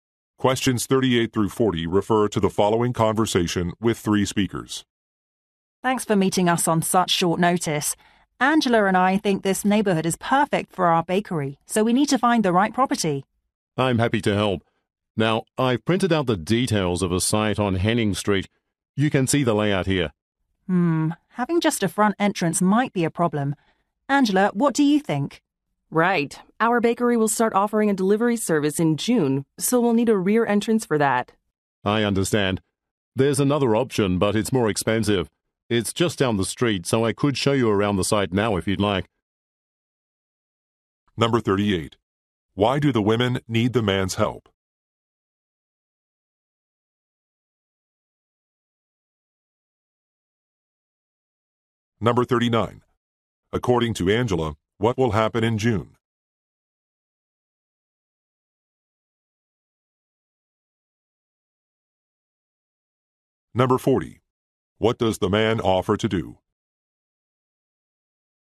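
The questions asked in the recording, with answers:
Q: Why do the women need the man's help?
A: To find a property for their bakery

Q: According to Angela, what will happen in June?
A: The bakery will start a delivery service

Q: What does the man offer to do?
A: Show them another site now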